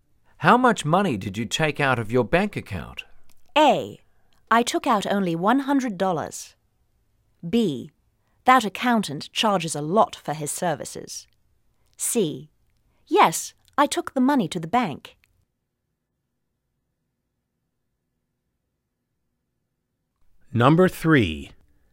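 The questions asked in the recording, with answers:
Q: How much money did you take out of your bank account?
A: A: I took out only $100.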